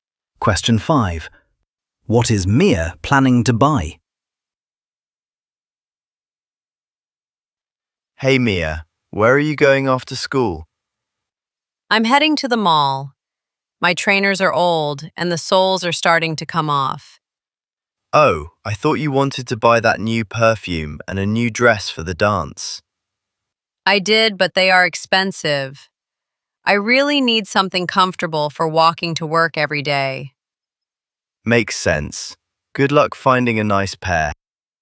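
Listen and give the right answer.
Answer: new trainers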